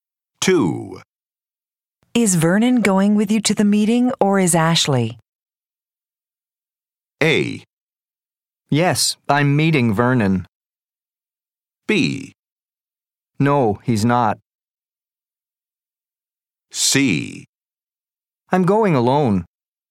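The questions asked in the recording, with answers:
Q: Is Vernon going with you to the meeting or is Ashley?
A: C: I'm going alone.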